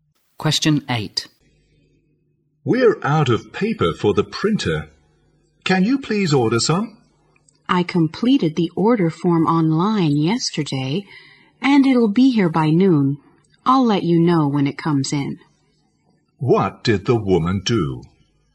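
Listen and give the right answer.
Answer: She ordered printer paper online yesterday.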